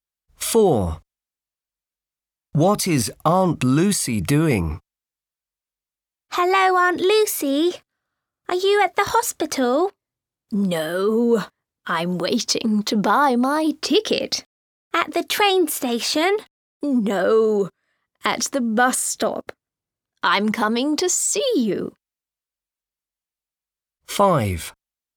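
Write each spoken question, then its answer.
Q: What is Aunt Lucy doing?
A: Waiting at the bus stop to buy her ticket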